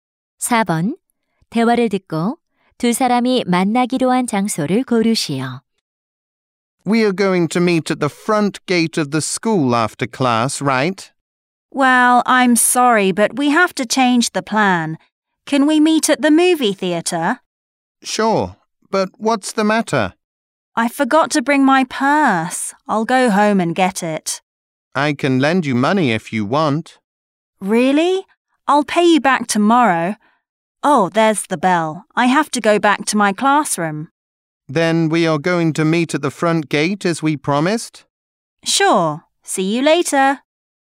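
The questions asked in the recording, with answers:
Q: 대화를 듣고 두 사람이 만나기로 한 장소를 고르시오.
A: 학교 정문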